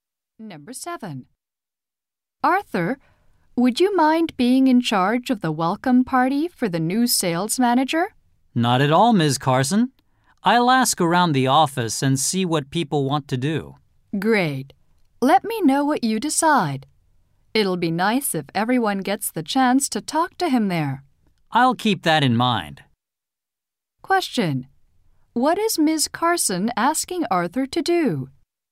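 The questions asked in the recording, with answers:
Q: What is Ms. Carson asking Arthur to do?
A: Organize the welcome party for the new sales manager.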